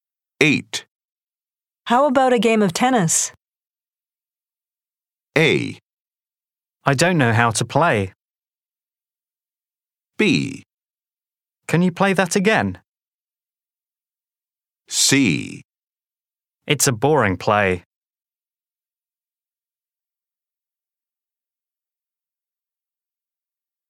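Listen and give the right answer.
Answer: A: I don't know how to play.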